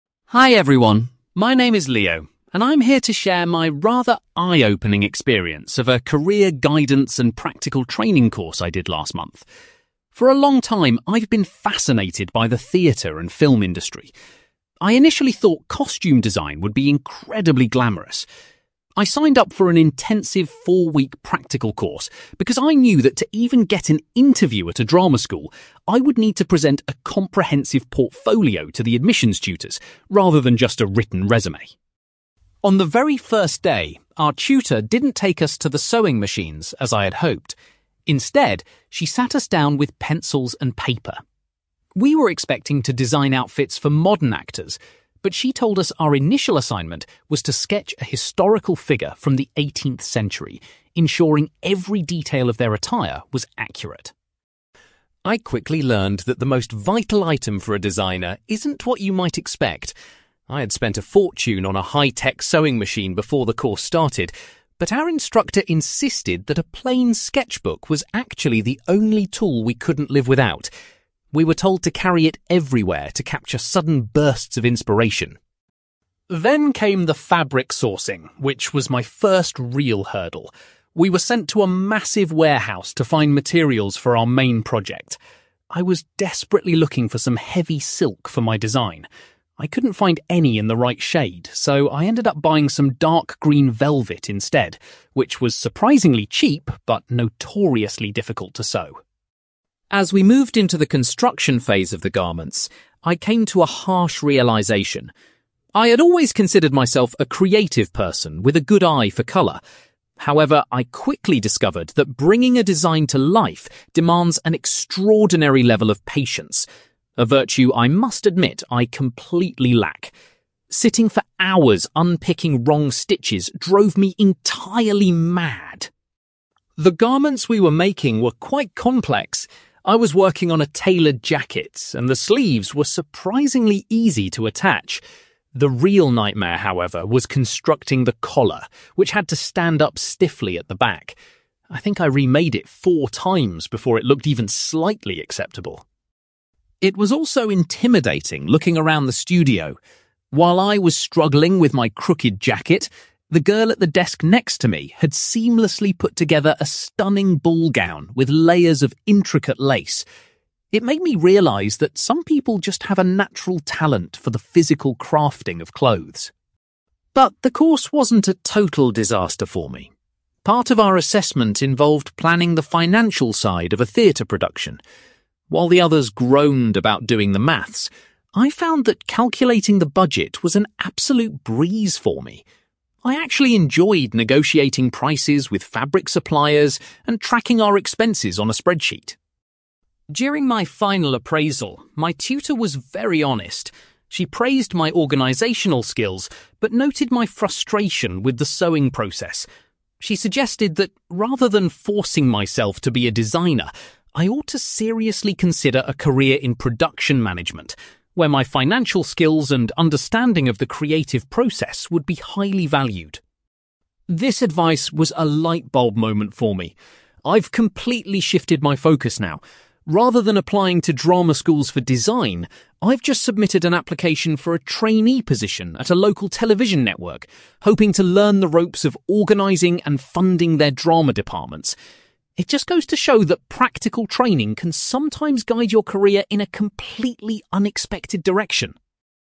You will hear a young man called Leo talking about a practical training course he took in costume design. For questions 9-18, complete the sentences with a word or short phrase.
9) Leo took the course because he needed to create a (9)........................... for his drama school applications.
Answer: portfolio

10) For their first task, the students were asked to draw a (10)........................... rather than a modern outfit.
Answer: historical figure

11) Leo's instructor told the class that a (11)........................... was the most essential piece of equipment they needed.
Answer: sketchbook

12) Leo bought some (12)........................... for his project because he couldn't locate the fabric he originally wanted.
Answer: velvet

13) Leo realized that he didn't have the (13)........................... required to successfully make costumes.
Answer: patience

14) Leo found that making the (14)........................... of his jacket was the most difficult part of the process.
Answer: collar

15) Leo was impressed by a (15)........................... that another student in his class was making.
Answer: ballgown

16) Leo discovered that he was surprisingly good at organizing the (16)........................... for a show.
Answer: budget

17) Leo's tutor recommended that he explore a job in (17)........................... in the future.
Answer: production management

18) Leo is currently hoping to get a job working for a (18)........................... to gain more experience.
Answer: television network

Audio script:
Leo: Hi everyone, my name is Leo, and I'm here to share my rather eye-opening experience of a career guidance and practical training course I did last month. For a long time, I've been fascinated by the theatre and film industry. I initially thought costume design would be incredibly glamorous. I signed up for an intensive four-week practical course because I knew that to even get an interview at a drama school, I would need to present a comprehensive portfolio to the admissions tutors, rather than just a written resume.
On the very first day, our tutor didn't take us to the sewing machines as I had hoped. Instead, she sat us down with pencils and paper. We were expecting to design outfits for modern actors, but she told us our initial assignment was to sketch a historical figure from the 18th century, ensuring every detail of their attire was accurate.
I quickly learned that the most vital item for a designer isn't what you might expect. I had spent a fortune on a high-tech sewing machine before the course started, but our instructor insisted that a plain sketchbook was actually the only tool we couldn't live without. We were told to carry it everywhere to capture sudden bursts of inspiration.
Then came the fabric sourcing, which was my first real hurdle. We were sent to a massive warehouse to find materials for our main project. I was desperately looking for some heavy silk for my design. I couldn't find any in the right shade, so I ended up buying some dark green velvet instead, which was surprisingly cheap but notoriously difficult to sew.
As we moved into the construction phase of the garments, I came to a harsh realization. I had always considered myself a creative person with a good eye for colour. However, I quickly discovered that bringing a design to life demands an extraordinary level of patience, a virtue I must admit I completely lack. Sitting for hours unpicking wrong stitches drove me entirely mad!
The garments we were making were quite complex. I was working on a tailored jacket, and the sleeves were surprisingly easy to attach. The real nightmare, however, was constructing the collar, which had to stand up stiffly at the back. I think I remade it four times before it looked even slightly acceptable.
It was also intimidating looking around the studio. While I was struggling with my crooked jacket, the girl at the desk next to me had seamlessly put together a stunning ballgown with layers of intricate lace. It made me realise that some people just have a natural talent for the physical crafting of clothes.
But the course wasn't a total disaster for me. Part of our assessment involved planning the financial side of a theatre production. While the others groaned about doing the maths, I found that calculating the budget was an absolute breeze for me. I actually enjoyed negotiating prices with fabric suppliers and tracking our expenses on a spreadsheet.
During my final appraisal, my tutor was very honest. She praised my organisational skills but noted my frustration with the sewing process. She suggested that rather than forcing myself to be a designer, I ought to seriously consider a career in production management, where my financial skills and understanding of the creative process would be highly valued.
This advice was a lightbulb moment for me. I've completely shifted my focus now. Rather than applying to drama schools for design, I've just submitted an application for a trainee position at a local television network, hoping to learn the ropes of organising and funding their drama departments. It just goes to show that practical training can sometimes guide your career in a completely unexpected direction!

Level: B2